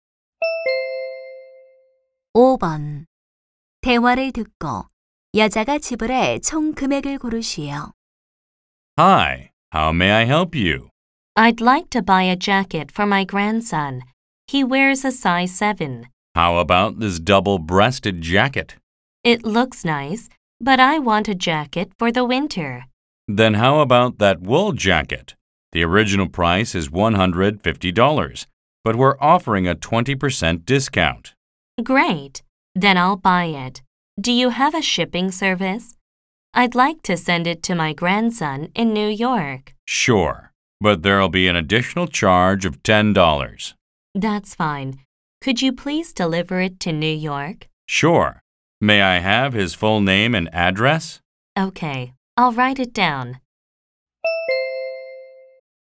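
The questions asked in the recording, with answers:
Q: 대화를 듣고 여자가 지불할 총 금액을 고르시오.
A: $130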